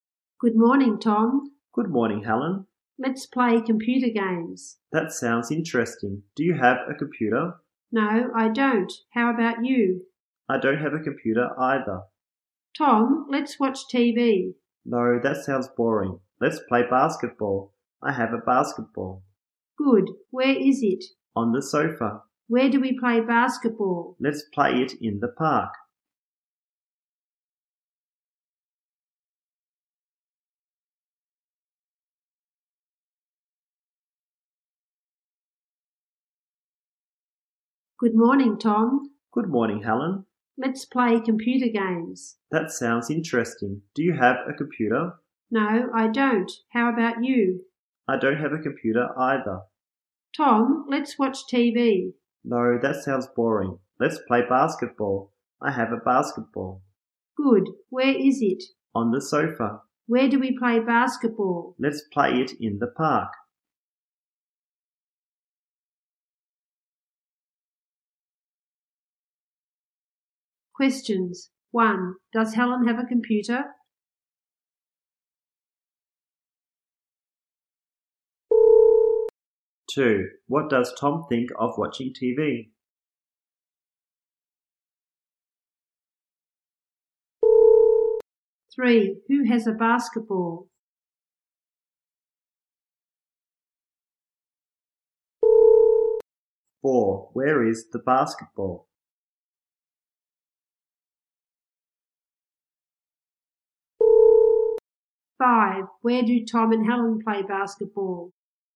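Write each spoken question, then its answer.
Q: Does Helen have a computer?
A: No, she doesn't.

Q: What does Tom think of watching TV?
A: Boring

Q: Where is the basketball?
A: On the sofa

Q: Where do Tom and Helen play basketball?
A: In the park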